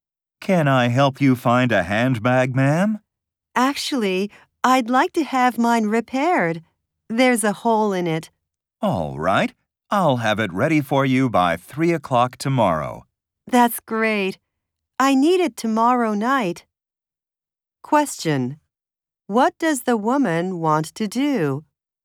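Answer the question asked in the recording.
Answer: Have her handbag repaired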